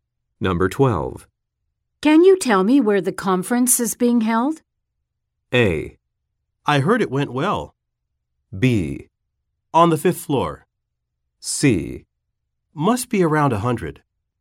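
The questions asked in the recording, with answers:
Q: Can you tell me where the conference is being held?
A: B: On the 5th floor.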